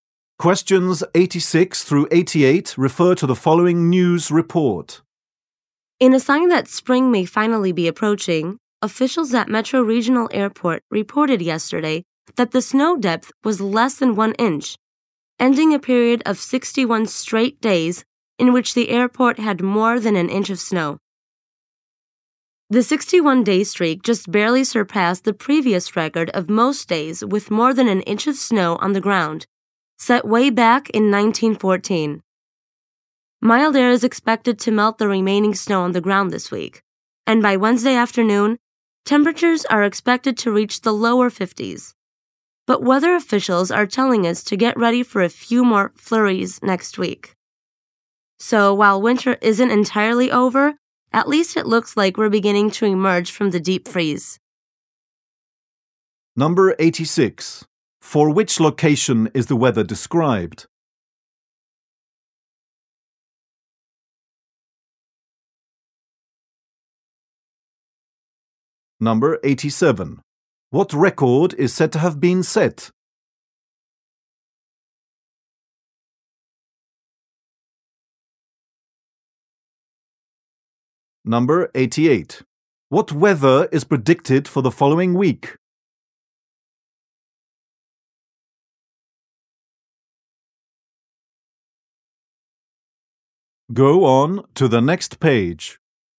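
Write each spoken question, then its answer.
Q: For which location is the weather described?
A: Metro Regional Airport

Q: What record is said to have been set?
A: Most consecutive days with more than an inch of snow

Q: What weather is predicted for the following week?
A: A few snow flurries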